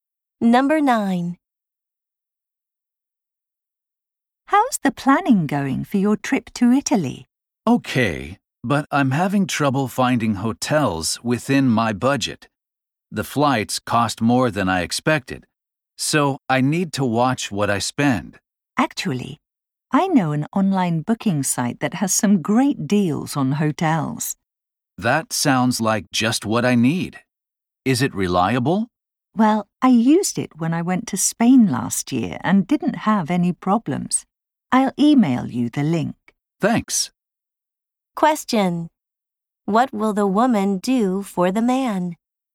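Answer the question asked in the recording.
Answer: Email him a link to a hotel booking site.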